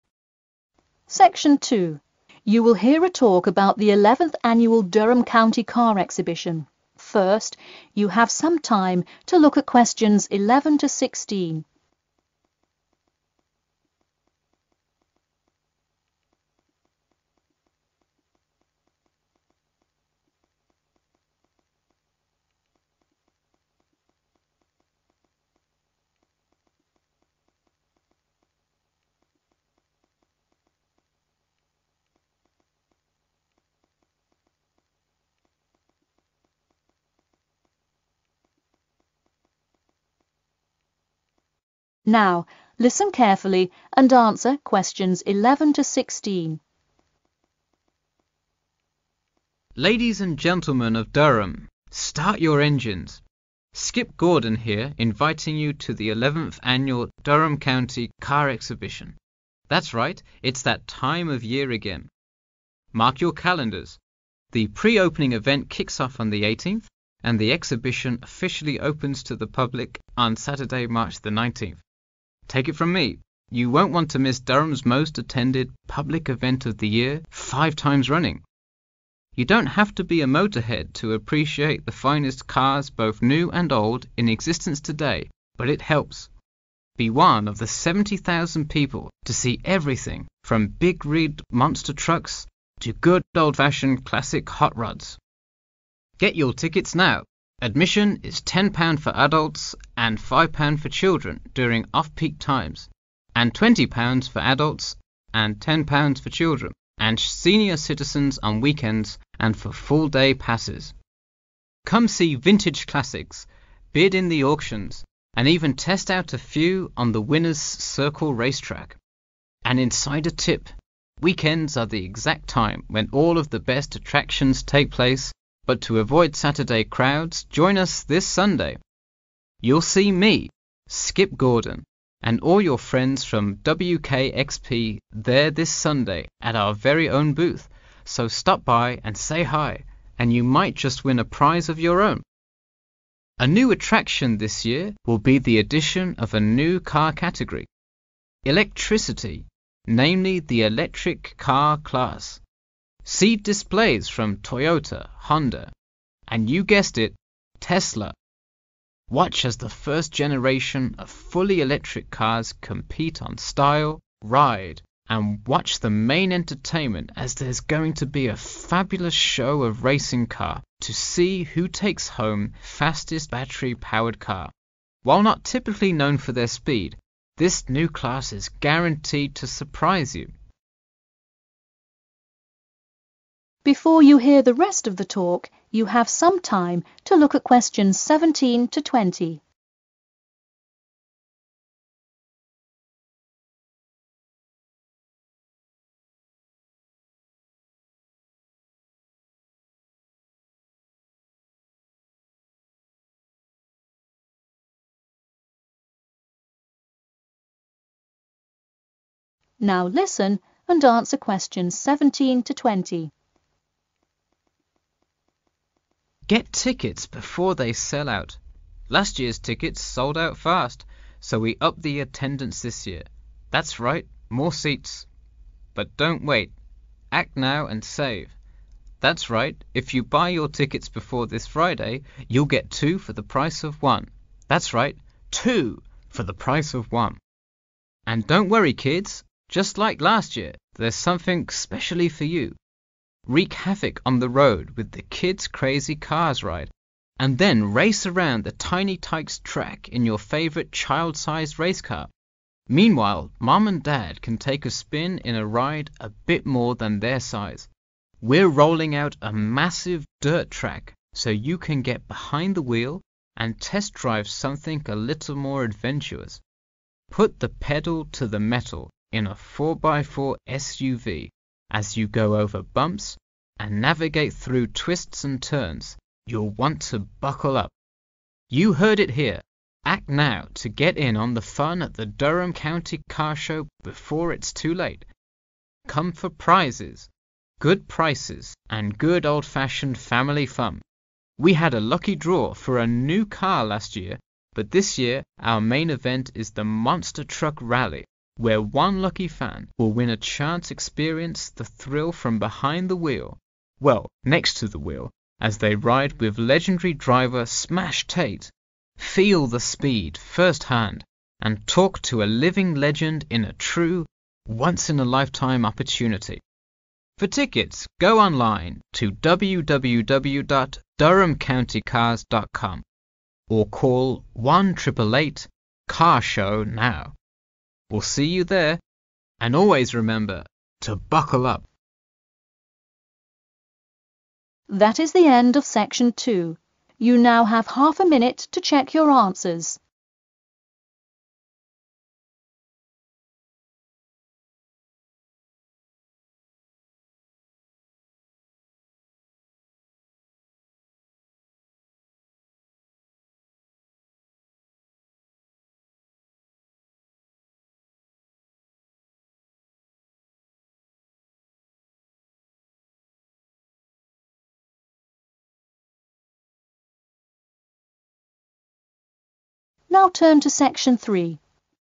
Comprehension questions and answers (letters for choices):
Complete the form below. Write NO MORE THAN TWO WORDS AND/OR A NUMBER for each answer.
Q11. Public grand opening date: 11...............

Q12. Number of viewers: 12...............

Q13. £ 13............... for children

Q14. Best day to visit: 14...............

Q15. New car category: 15...............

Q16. Entertainment included: 16...............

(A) last year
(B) this year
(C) both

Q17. Higher number of seats...............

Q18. Fun for children...............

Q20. Lucky draw for car...............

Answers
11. March 19(th)/19 March
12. 70,000
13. 5
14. (this) Sunday
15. electricity
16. racing car
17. B
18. C
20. A